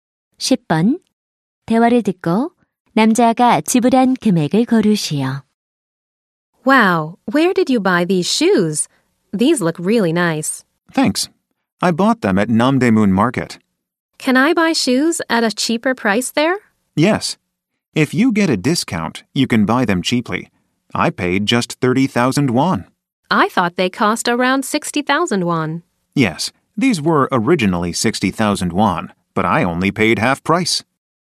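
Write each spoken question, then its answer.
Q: 대화를 듣고 남자가 지불한 금액을 고르시오.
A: 30,000원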